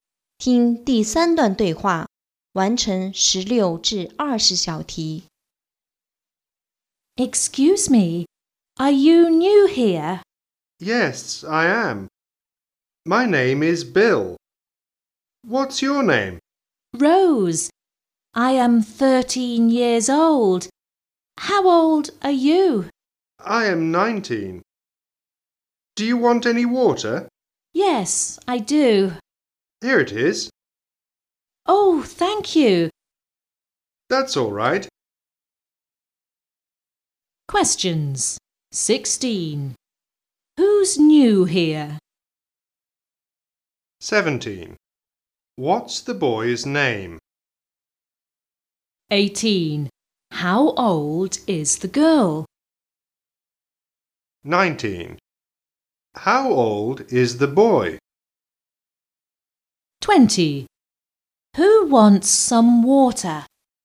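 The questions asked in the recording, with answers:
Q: Who's new here?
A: Bill

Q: What's the boy's name?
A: Bill

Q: How old is the girl?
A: 13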